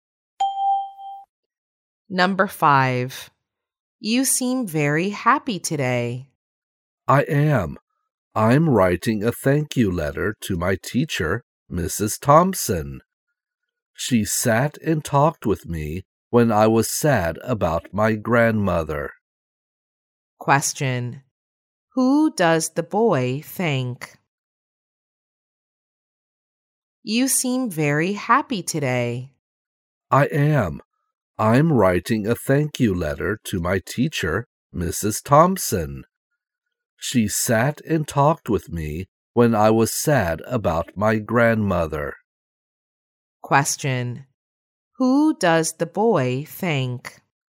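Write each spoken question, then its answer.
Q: Who does the boy thank?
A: His teacher, Mrs. Thompson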